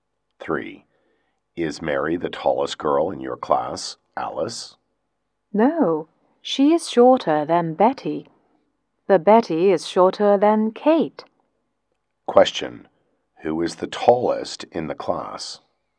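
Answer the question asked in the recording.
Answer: Kate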